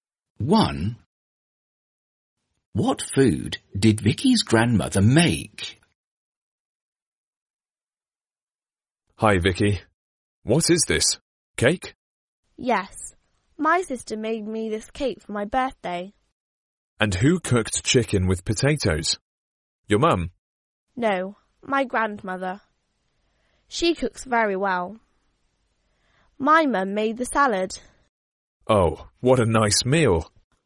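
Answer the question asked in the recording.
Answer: chicken with potatoes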